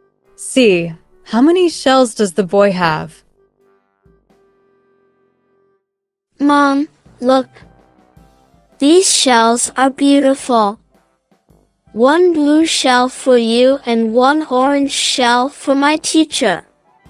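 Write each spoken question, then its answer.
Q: How many shells does the boy have?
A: two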